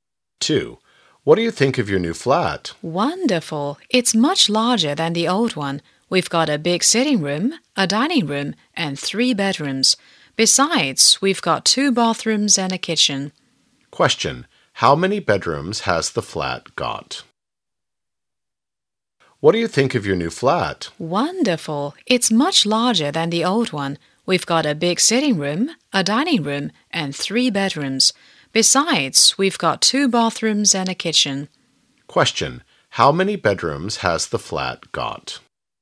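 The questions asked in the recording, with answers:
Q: How many bedrooms has the flat got?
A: Three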